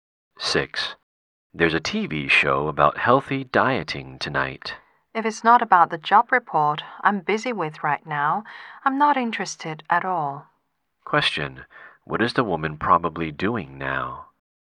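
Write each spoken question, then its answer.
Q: What is the woman probably doing now?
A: Working on a job report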